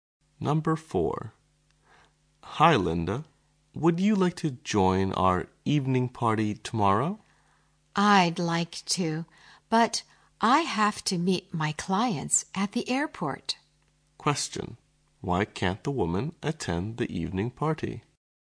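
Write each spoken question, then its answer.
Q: Why can't the woman attend the evening party?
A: She has to meet her clients at the airport.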